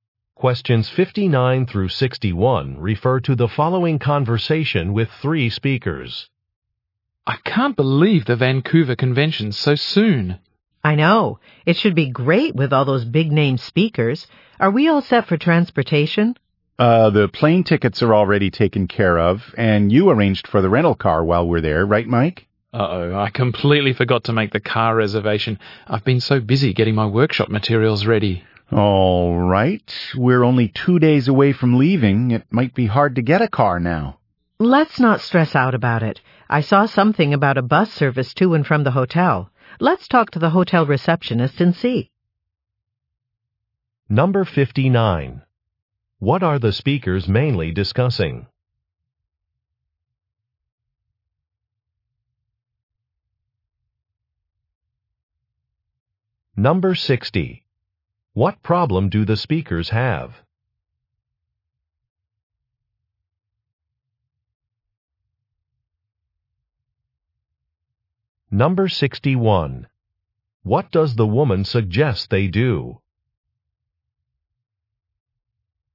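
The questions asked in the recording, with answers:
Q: What are the speakers mainly discussing?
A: Transportation for a convention trip

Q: What problem do the speakers have?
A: The rental car was not reserved

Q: What does the woman suggest they do?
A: Ask the hotel receptionist about a bus service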